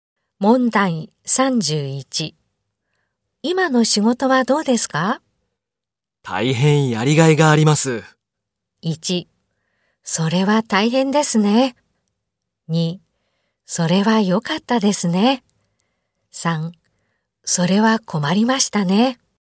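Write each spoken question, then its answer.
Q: 今の仕事はどうですか?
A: 2: それは良かったですね。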